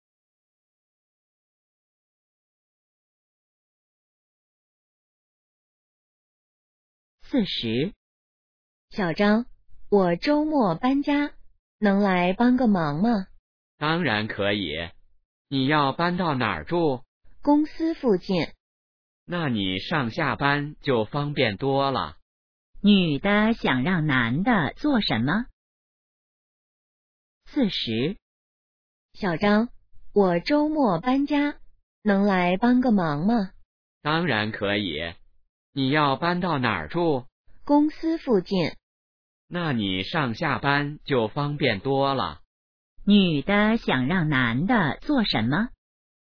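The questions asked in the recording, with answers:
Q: 女的想让男的做什么?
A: 周末帮忙搬家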